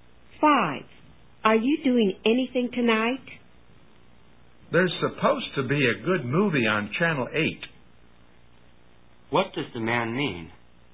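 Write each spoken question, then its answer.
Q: What does the man mean?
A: He suggests watching a good movie on Channel 8 tonight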